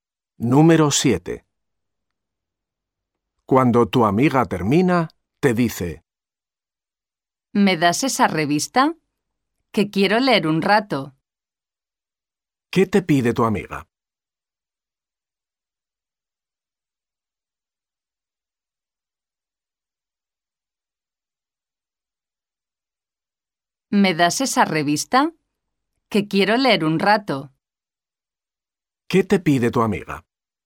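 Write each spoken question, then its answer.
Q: ¿Qué te pide tu amiga?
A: Una revista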